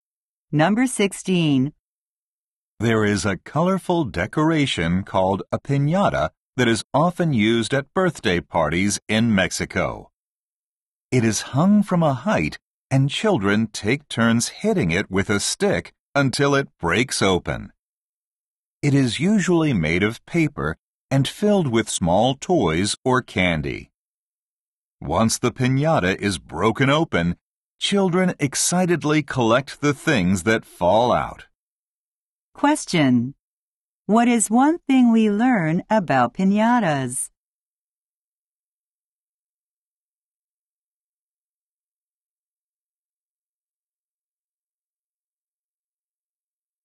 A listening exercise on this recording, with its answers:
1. What is one thing we learn about piñatas?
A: They are filled with toys or candy.

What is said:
There is a colorful decoration called a piñata that is often used at birthday parties in Mexico. It is hung from a height and children take turns hitting it with a stick until it breaks open. It is usually made of paper and filled with small toys or candy. Once the piñata is broken open, children excitedly collect the things that fall out.
Question: What is one thing we learn about piñatas?

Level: 英検準2級プラス